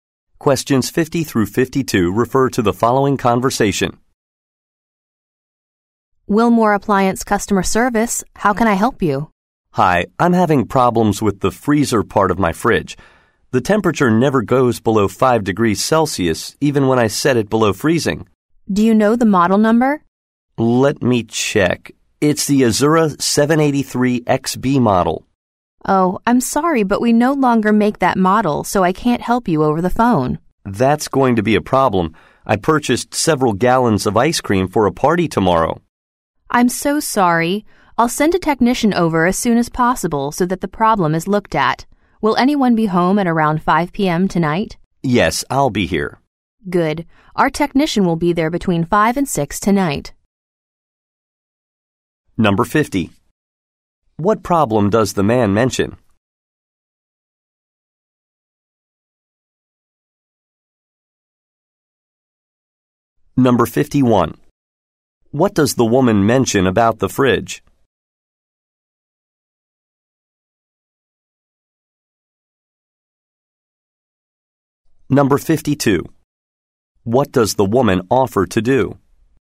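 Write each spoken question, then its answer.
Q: What does the woman mention about the fridge?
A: The model is no longer made

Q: What does the woman offer to do?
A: Send a technician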